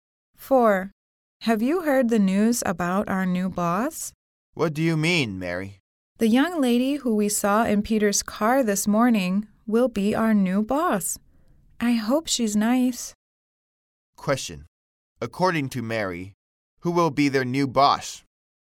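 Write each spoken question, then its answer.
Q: According to Mary, who will be their new boss?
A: The young lady they saw in Peter's car this morning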